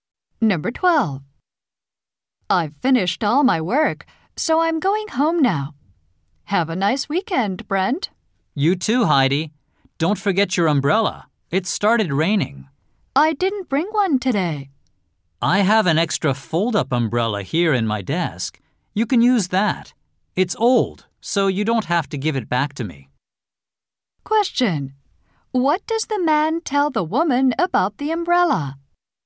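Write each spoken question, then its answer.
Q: What does the man tell the woman about the umbrella?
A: She doesn't have to give it back.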